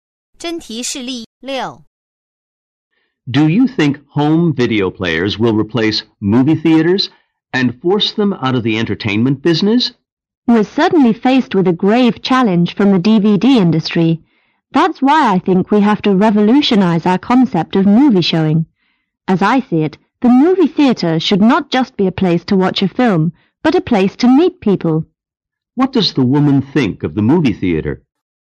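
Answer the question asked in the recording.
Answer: It should be a place to meet people as well as to watch films.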